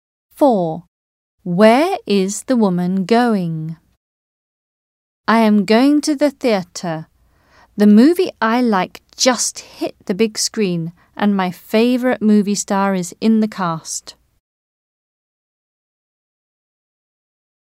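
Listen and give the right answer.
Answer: to the theatre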